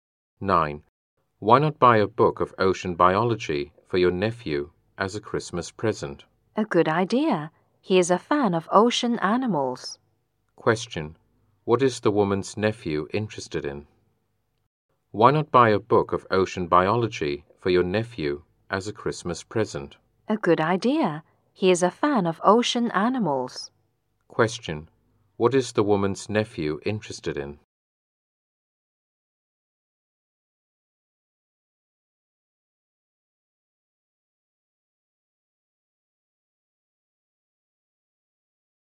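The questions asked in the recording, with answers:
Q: What is the woman's nephew interested in?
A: Ocean animals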